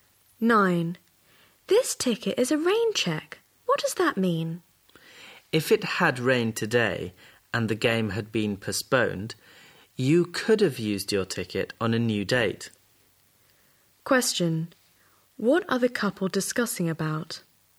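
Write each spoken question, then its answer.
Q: What are the couple discussing about?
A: What a rain check ticket means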